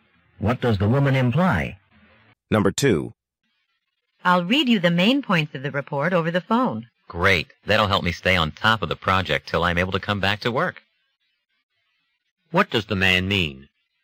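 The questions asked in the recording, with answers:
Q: What does the man mean?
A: Hearing the report's main points will keep him up to date until he returns to work.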